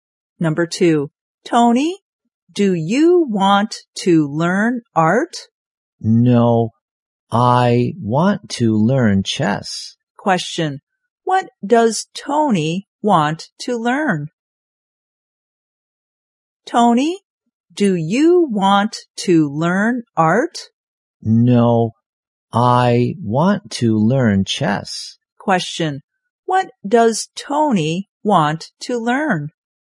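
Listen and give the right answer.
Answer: Chess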